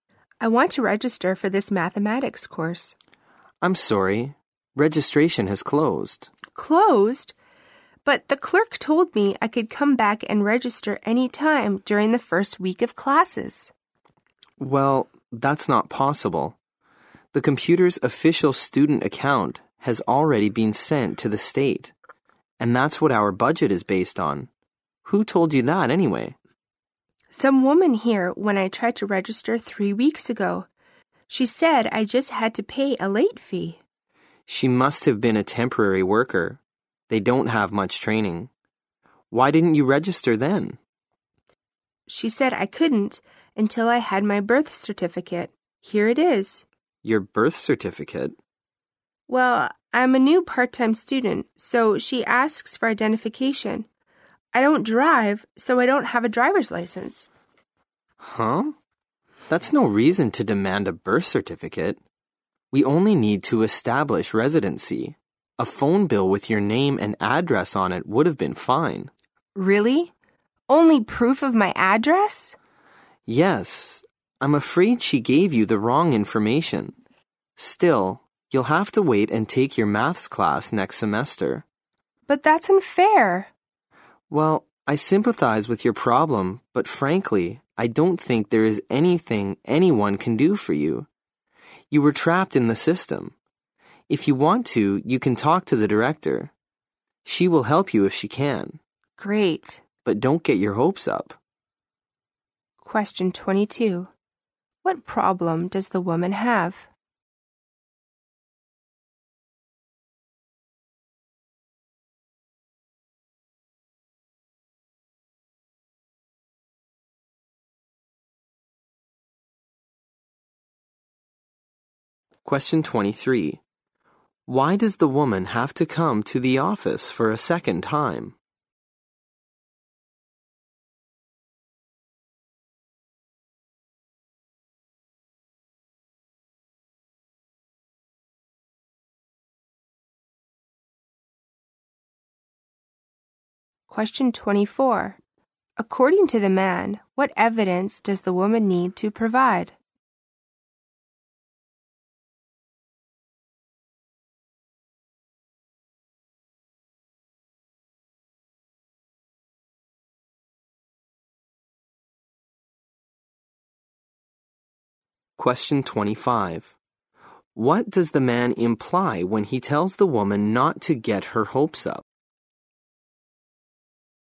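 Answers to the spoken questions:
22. She can't register for the math course because registration has closed.
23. She was told she needed her birth certificate to register.
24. Proof of her address, such as a phone bill with her name and address.
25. The director probably can't help her.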